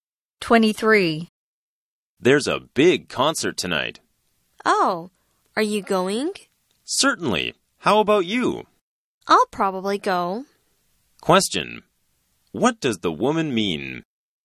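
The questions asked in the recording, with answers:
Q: What does the woman mean?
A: She will probably go to the concert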